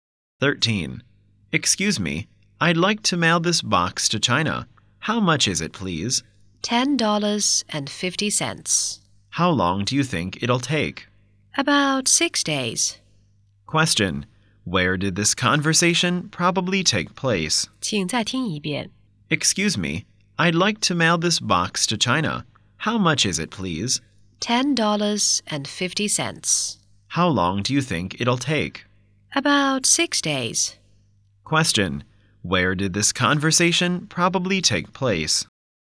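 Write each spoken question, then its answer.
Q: Where did this conversation probably take place?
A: At a post office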